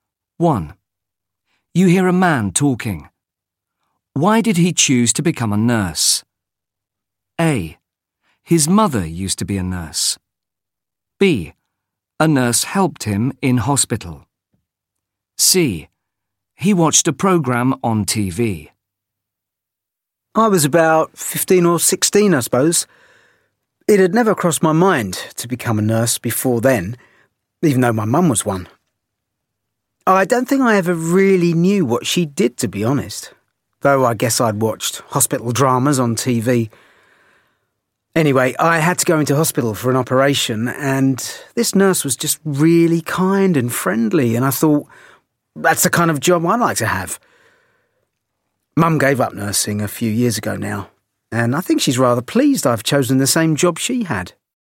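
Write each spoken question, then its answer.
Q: Why did he choose to become a nurse?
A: B: A nurse helped him in hospital.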